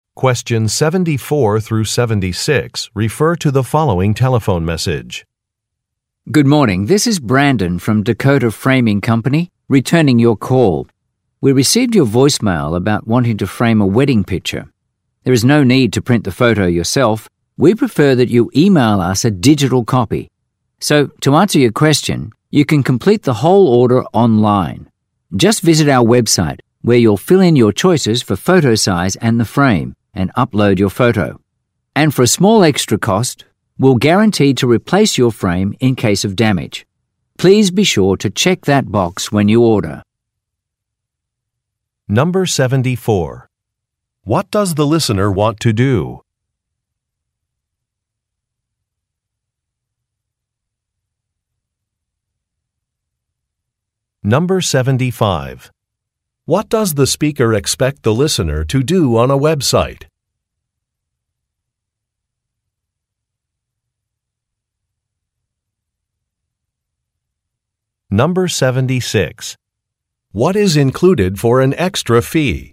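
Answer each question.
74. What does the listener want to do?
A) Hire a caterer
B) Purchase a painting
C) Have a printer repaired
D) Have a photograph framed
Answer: D

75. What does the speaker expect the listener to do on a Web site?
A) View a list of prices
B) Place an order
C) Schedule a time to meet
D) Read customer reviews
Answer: B

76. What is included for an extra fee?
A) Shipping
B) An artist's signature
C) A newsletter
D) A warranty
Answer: D

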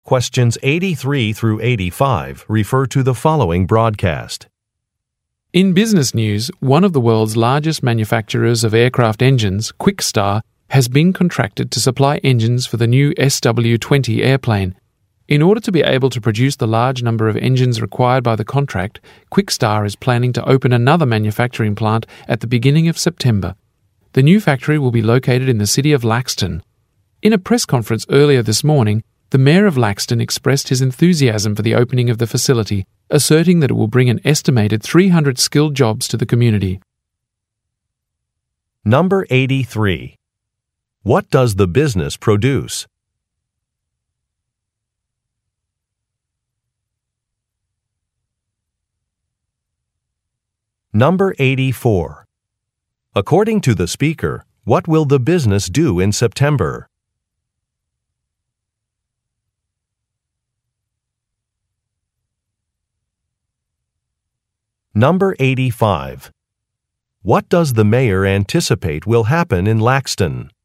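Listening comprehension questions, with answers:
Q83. What does the business produce?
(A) Lightbulbs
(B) Portable radios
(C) Automobile tires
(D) Airplane engines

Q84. According to the speaker, what will the business do in September?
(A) Implement a recycling program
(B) Launch an advertising campaign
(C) Open a new manufacturing plant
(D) Raise the salary of its employees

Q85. What does the mayor anticipate will happen in Laxton?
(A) More traffic laws will be passed.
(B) Employment opportunities will increase.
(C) An energy policy will be revised.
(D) Public transportation services will improve.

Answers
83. D
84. C
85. B

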